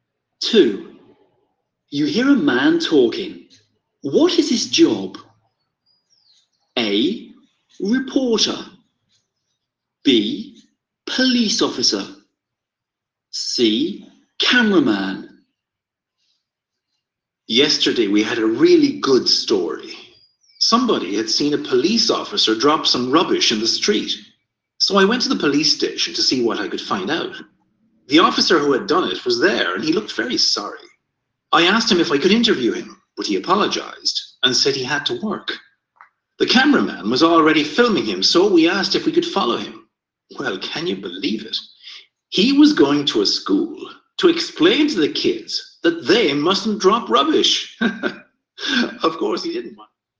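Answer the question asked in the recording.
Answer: A: Reporter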